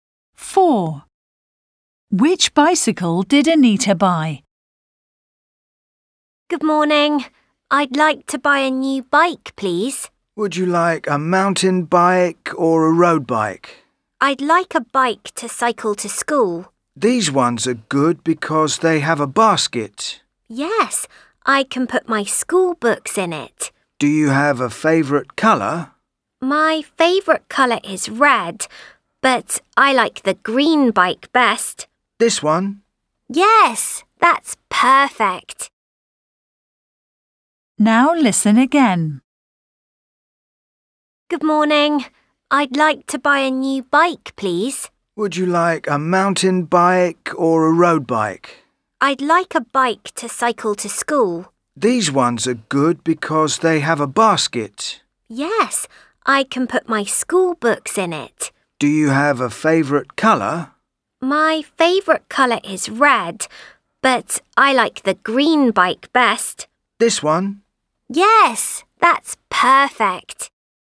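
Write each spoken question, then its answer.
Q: Which bicycle did Anita buy?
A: the green bike with a basket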